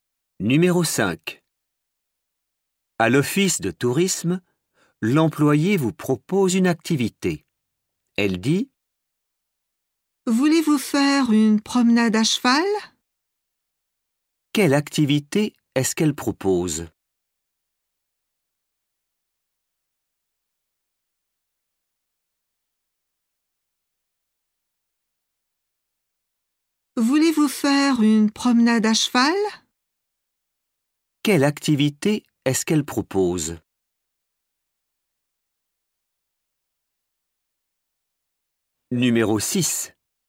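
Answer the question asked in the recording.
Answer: une promenade à cheval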